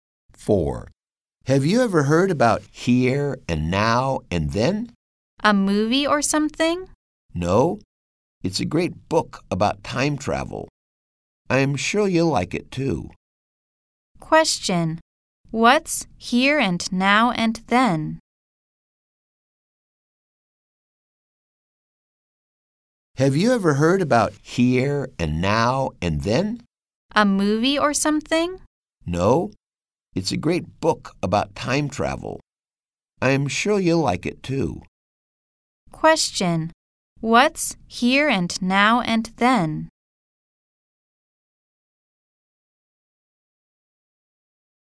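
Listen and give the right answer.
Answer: A book about time travel.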